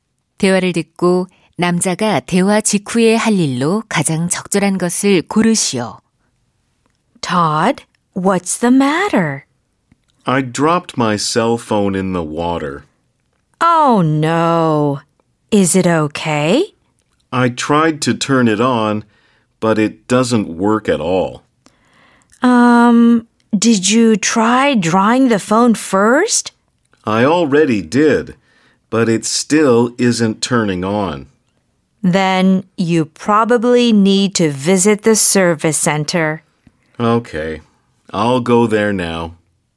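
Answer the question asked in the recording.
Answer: 서비스 센터 방문하기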